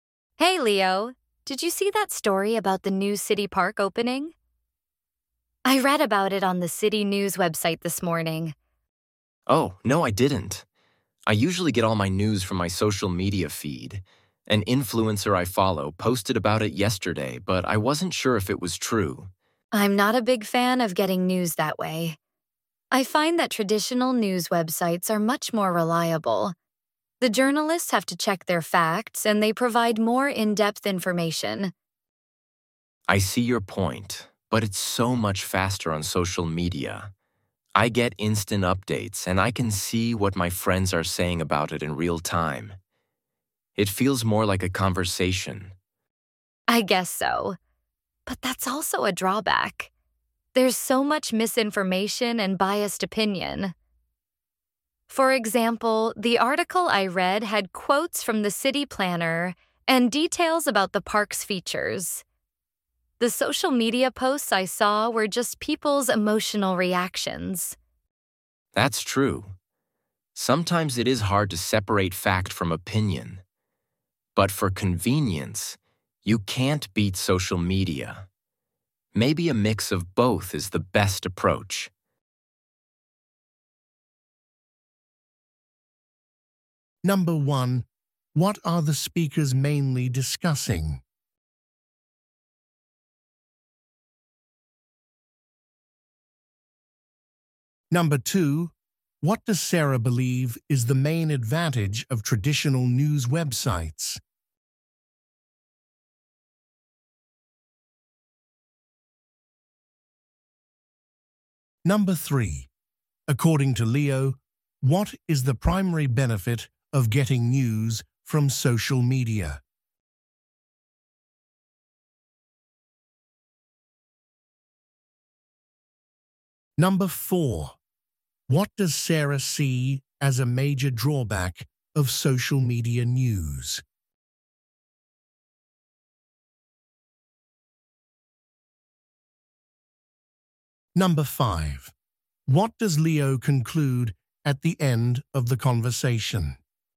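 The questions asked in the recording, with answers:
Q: what are the speakers mainly discussing?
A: Getting news from traditional news websites versus social media

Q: what does Sarah believe is the main advantage of traditional news websites?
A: They are more reliable: journalists check facts and give more in-depth information

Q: according to Leo, what is the primary benefit of getting news from social media?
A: It is faster, with instant updates and friends' reactions in real time

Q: what does Sarah see as a major drawback of social media news?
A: There is a lot of misinformation and biased opinion

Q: what does Leo conclude at the end of the conversation?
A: A mix of both is probably the best approach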